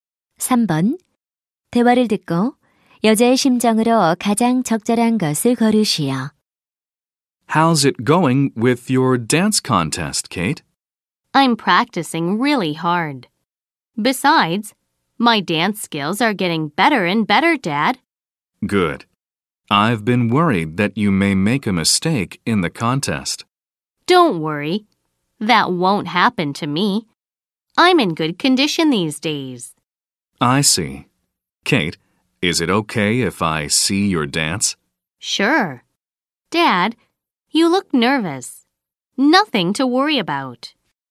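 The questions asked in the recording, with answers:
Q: 대화를 듣고 여자의 심정으로 가장 적절한 것을 고르시오.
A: 자신감 있음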